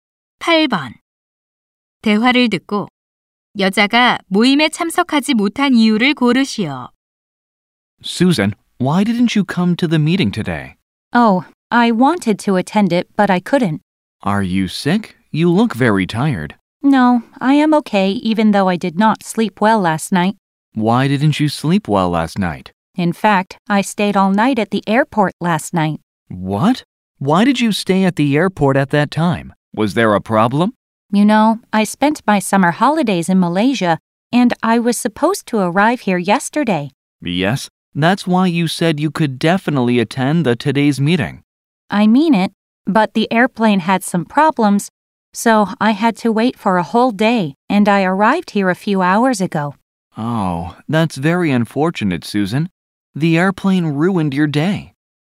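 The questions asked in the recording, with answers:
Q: 대화를 듣고 여자가 모임에 참석하지 못한 이유를 고르시오.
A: 비행기 문제로 공항에서 하루를 기다려서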